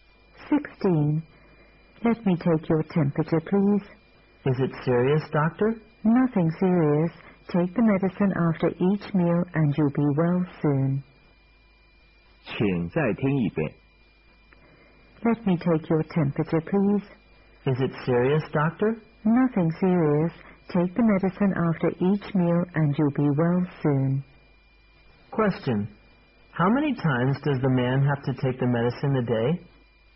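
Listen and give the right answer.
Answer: Three times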